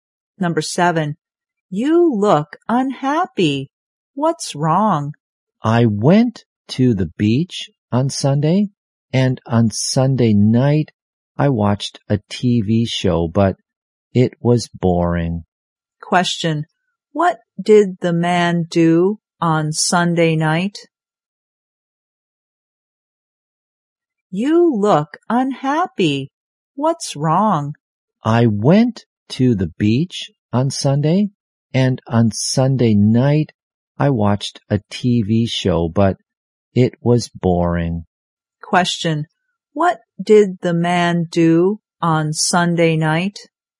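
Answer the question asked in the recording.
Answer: He watched a TV show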